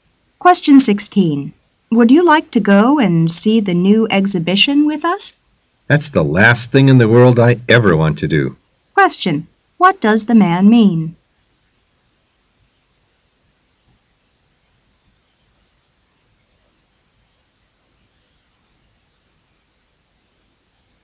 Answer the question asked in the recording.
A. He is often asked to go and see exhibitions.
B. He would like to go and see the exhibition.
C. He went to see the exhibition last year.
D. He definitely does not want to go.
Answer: D. He definitely does not want to go.

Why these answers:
W: Would you like to go and see the new exhibition with us? M: That's the last thing in the world I ever want to do. Q: What does the man mean?

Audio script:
[解析] W: Would you like to go and see the new exhibition with us? M: That's the last thing in the world I ever want to do. Q: What does the man mean?